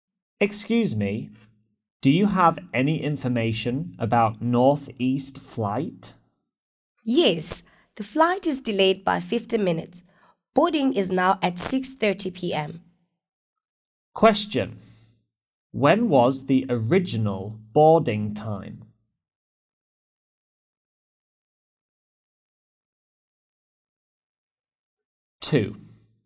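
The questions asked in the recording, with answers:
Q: When was the original boarding time?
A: 5:40 p.m.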